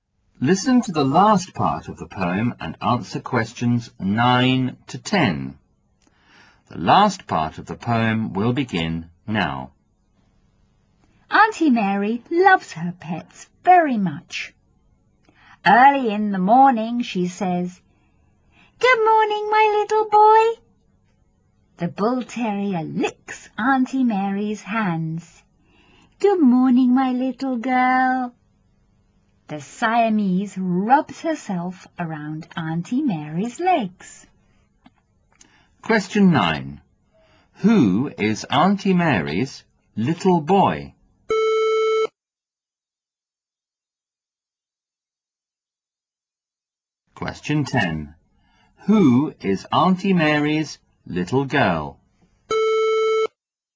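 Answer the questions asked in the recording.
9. The bull terrier
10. The Siamese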